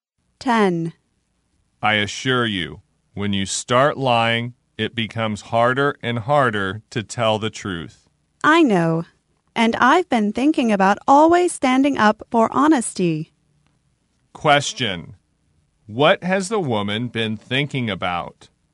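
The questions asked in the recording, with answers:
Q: What has the woman been thinking about?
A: Always standing up for honesty.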